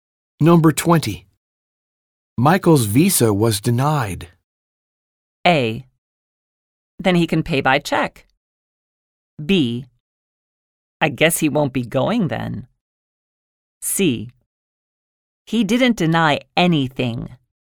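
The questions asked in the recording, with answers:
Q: Michael's visa was denied.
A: B: I guess he won't be going then.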